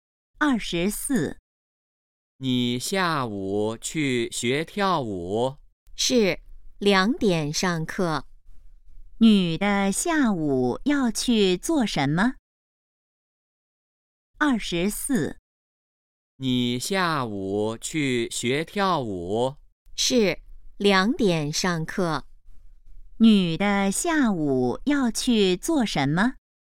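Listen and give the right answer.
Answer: 学跳舞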